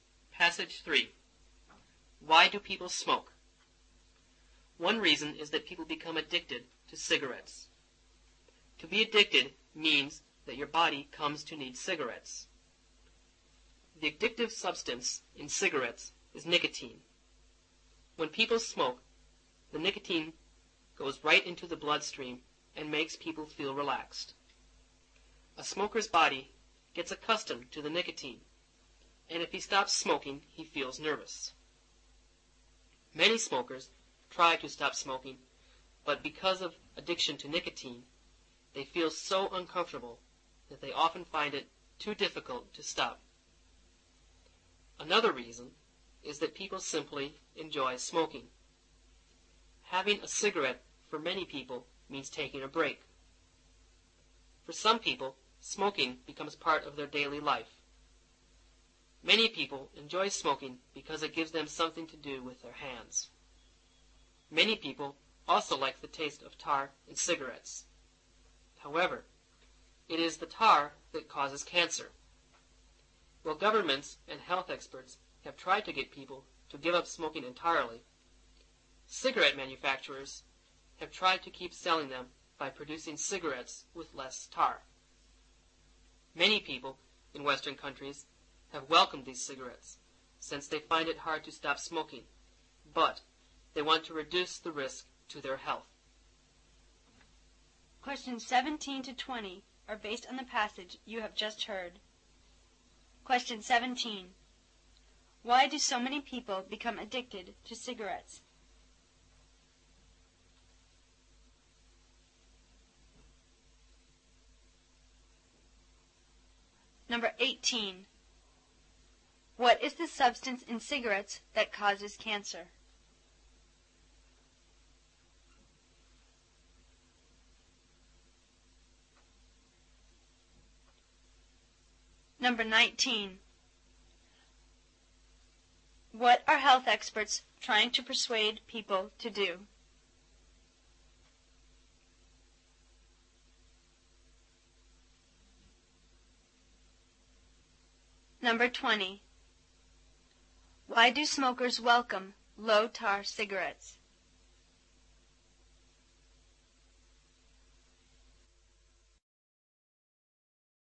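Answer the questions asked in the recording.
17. Because of the nicotine, which their bodies come to need
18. Tar
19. Give up smoking entirely
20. They find it hard to stop smoking but want to reduce the risk to their health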